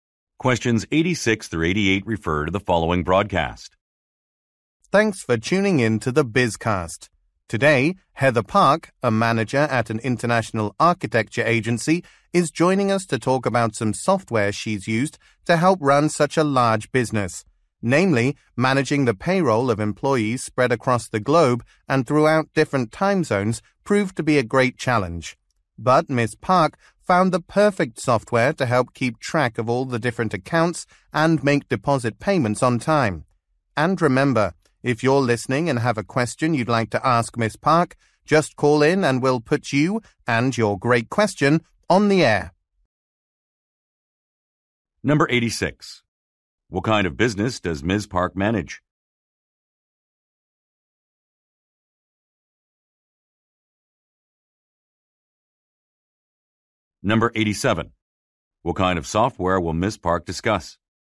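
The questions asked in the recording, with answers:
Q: What kind of business does Ms. Park manage?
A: An international architecture agency

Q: What kind of software will Ms. Park discuss?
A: Payroll software

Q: What are the listeners encouraged to do?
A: Call in with questions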